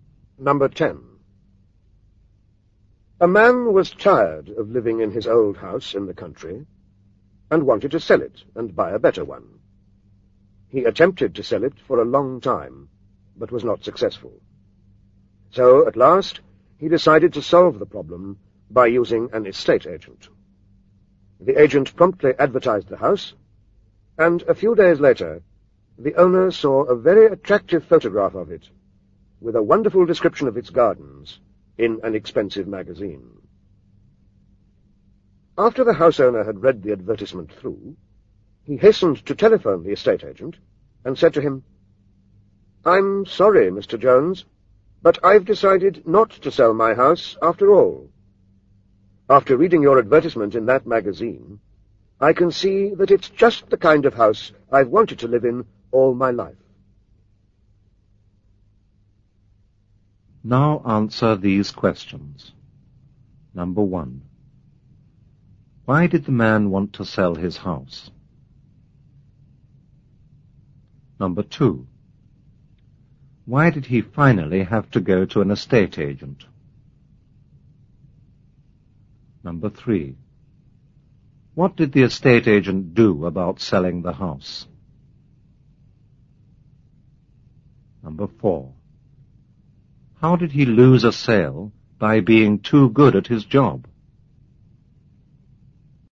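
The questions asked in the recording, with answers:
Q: Why did the man want to sell his house?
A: He was tired of living in his old house and wanted a better one.

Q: Why did he finally have to go to an estate agent?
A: He had tried to sell it himself for a long time without success.

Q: What did the estate agent do about selling the house?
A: He advertised it in an expensive magazine, with an attractive photograph and a wonderful description.

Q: How did he lose a sale by being too good at his job?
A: His advertisement made the house sound so good that the owner decided to keep it.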